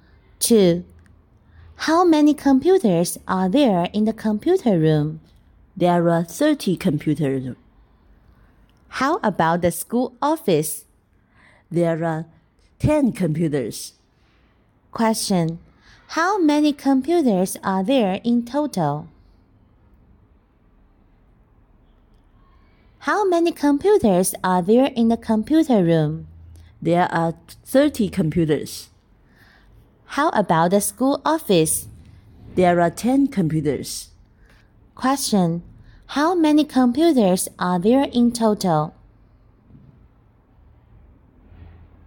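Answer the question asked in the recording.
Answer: 40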